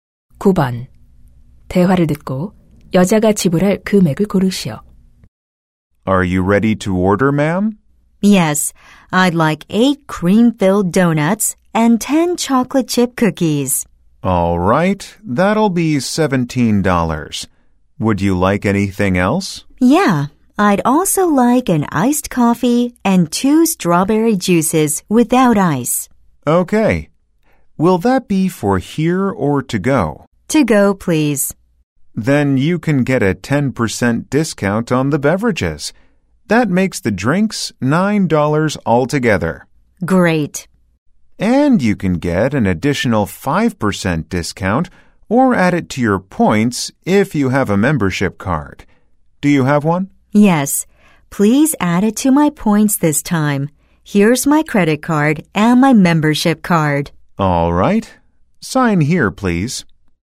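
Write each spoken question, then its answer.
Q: 대화를 듣고 여자가 지불할 금액을 고르시오.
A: $26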